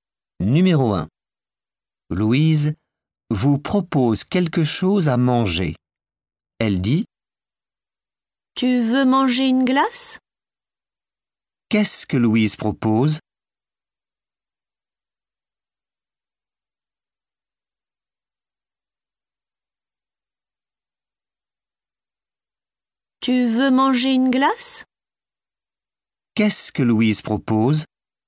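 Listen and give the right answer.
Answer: une glace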